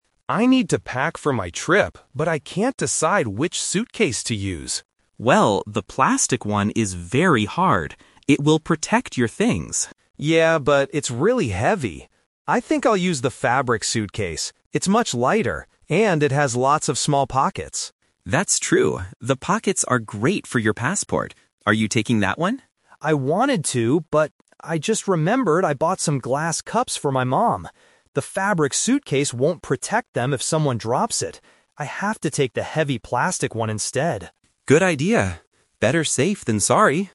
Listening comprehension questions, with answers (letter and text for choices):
Listen to the conversation and choose the correct answer (A, B, or C).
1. Why doesn't Alex want to use the plastic suitcase at first?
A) It is too small.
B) It is really heavy.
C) It does not have pockets.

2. According to Sam, what are the small pockets good for?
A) A passport.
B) Glass cups.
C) Airplane tickets.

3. Which suitcase does Alex choose in the end?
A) The fabric suitcase, because it is light.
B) The plastic suitcase, to protect the glass cups.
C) He decides to buy a new suitcase.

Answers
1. B) It is really heavy.
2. A) A passport.
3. B) The plastic suitcase, to protect the glass cups.

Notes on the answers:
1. Alex clearly states that the plastic suitcase is "really heavy." Option A is a plausible problem for a suitcase but is not mentioned in the audio. Option C is a trap because having pockets is a feature of the fabric suitcase, but Alex doesn't explicitly complain about the lack of pockets on the plastic one.
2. Sam says, "The pockets are great for your passport." Option B is a trap because the glass cups are the reason Alex chooses the plastic suitcase later. Option C is plausible (people put tickets in pockets) but it is not mentioned in the dialogue.
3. This question uses the "Twist" technique. Alex initially plans to use the fabric suitcase because it is light, but changes his mind when he remembers the glass cups. He decides he has to take the plastic one to protect them. Option A is the main trap (his original plan). Option C is incorrect.

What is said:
Alex: I need to pack for my trip, but I can't decide which suitcase to use.
Sam: Well, the plastic one is very hard. It will protect your things.
Alex: Yeah, but it's really heavy. I think I'll use the fabric suitcase. It's much lighter, and it has lots of small pockets.
Sam: That's true. The pockets are great for your passport. Are you taking that one?
Alex: I wanted to, but... I just remembered I bought some glass cups for my mom. The fabric suitcase won't protect them if someone drops it. I have to take the heavy plastic one instead.